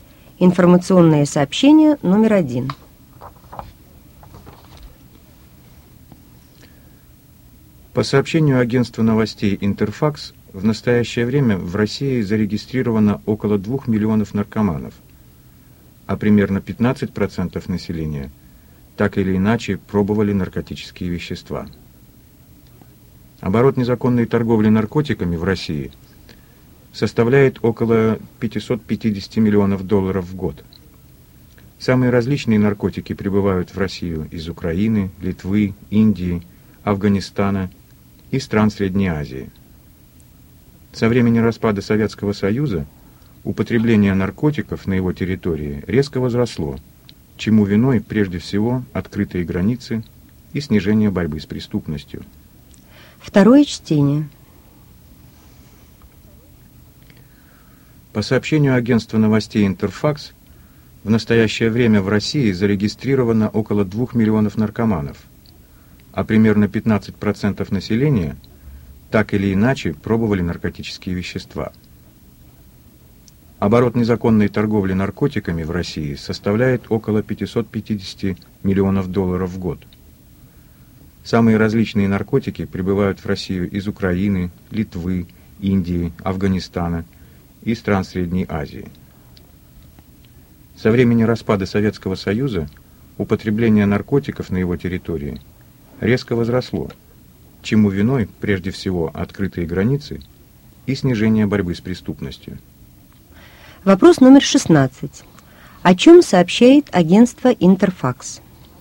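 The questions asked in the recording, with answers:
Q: О чем сообщает агентство «Интерфакс»?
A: О распространении наркомании и незаконной торговле наркотиками в России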